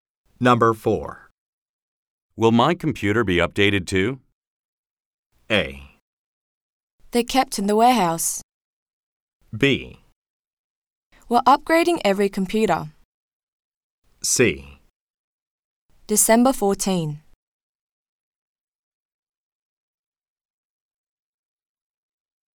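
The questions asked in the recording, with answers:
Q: Will my computer be updated too?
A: B: We're upgrading every computer.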